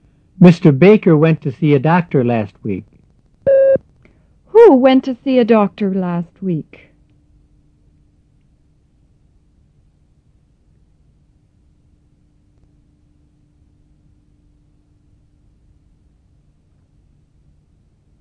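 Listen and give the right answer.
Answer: Mr. Baker.

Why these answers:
Mr. Baker went to see a doctor last week.

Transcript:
Mr. Baker went to see a doctor last week. Who went to see a doctor last week? (Mr.

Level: 入门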